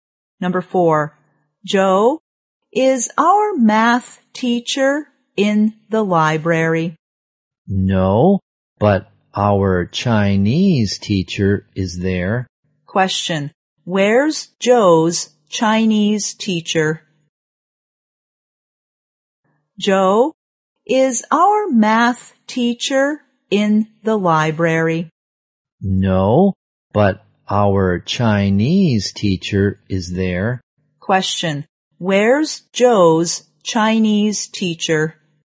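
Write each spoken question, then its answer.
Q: Where's Joe's Chinese teacher?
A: In the library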